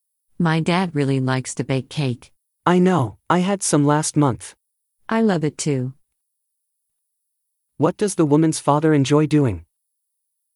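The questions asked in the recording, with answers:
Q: What does the woman's father enjoy doing?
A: Baking cake.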